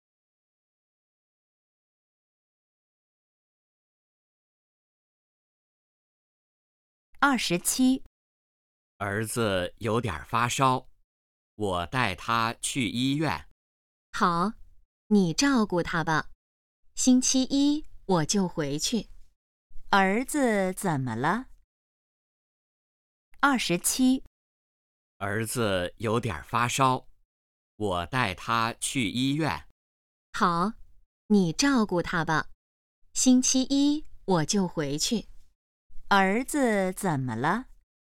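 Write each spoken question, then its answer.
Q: 儿子怎么了?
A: 有点发烧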